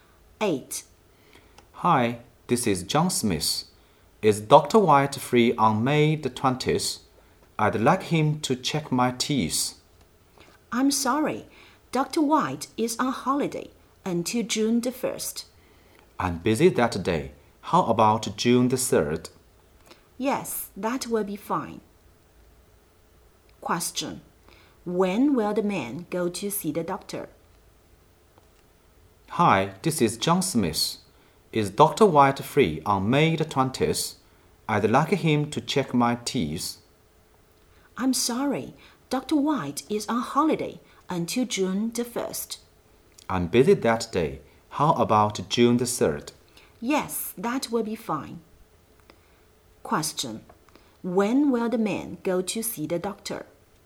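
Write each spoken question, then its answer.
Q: When will the man go to see the doctor?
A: On June the 3rd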